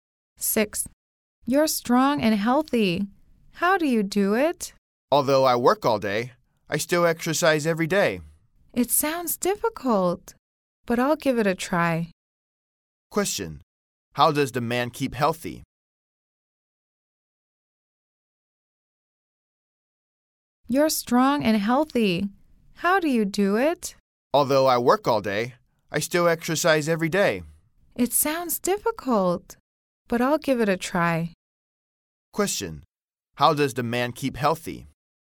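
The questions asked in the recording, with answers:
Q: How does the man keep healthy?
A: He exercises every day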